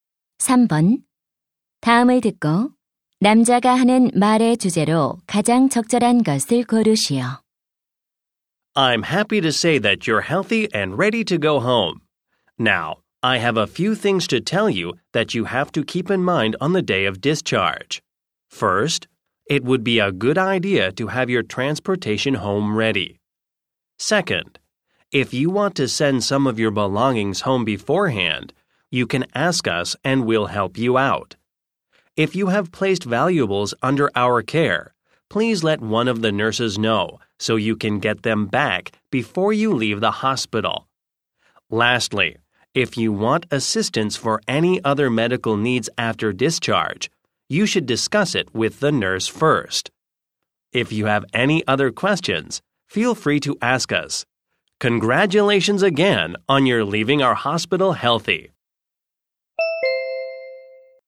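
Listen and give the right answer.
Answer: 퇴원 시 유의 사항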